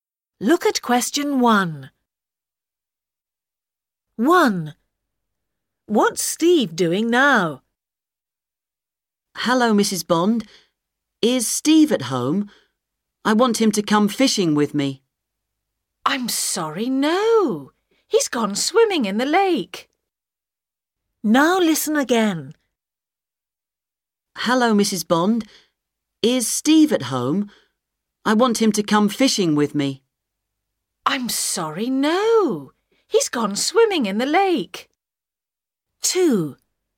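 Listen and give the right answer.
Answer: Swimming in the lake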